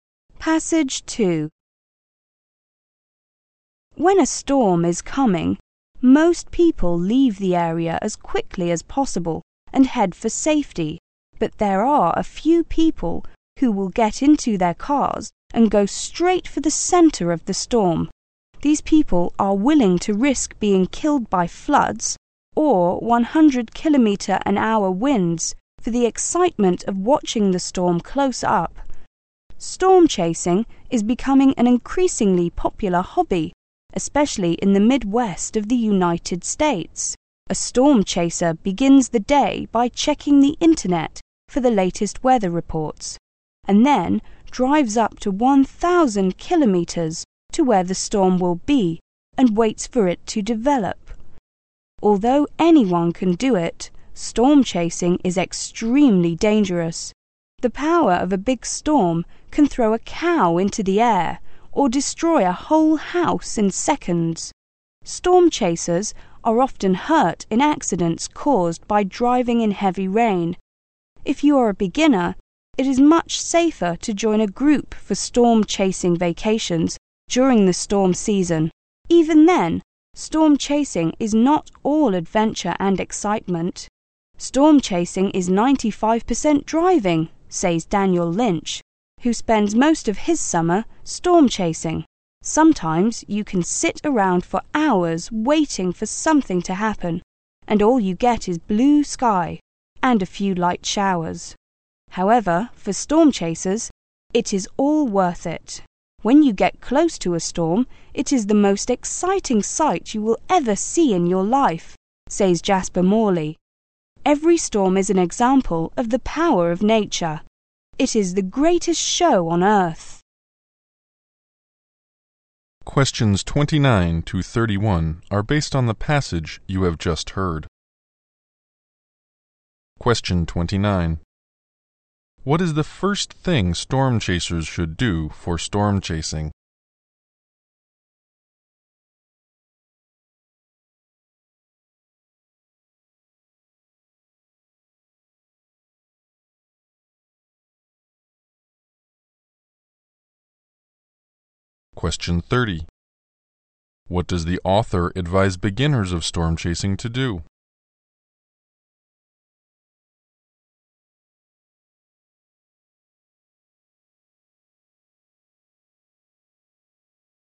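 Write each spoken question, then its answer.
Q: What is the first thing storm chasers should do for storm chasing?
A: Check the internet for the latest weather reports.

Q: What does the author advise beginners of storm chasing to do?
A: Join a group for storm chasing vacations.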